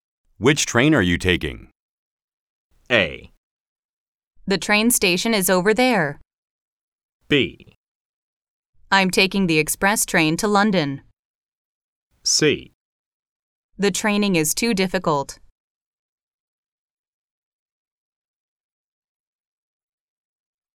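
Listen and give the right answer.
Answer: B: I'm taking the express train to London.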